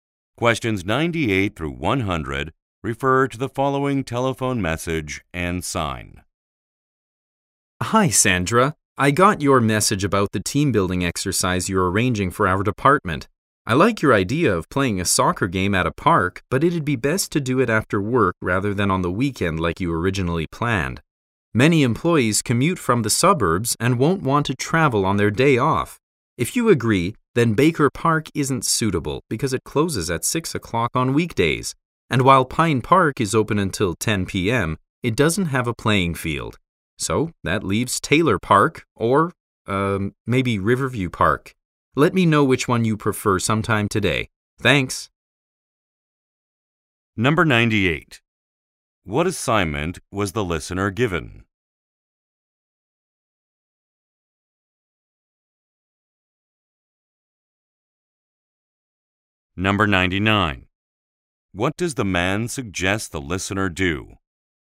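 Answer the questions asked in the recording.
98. Arranging a team building exercise for the department
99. Hold the soccer game after work instead of on the weekend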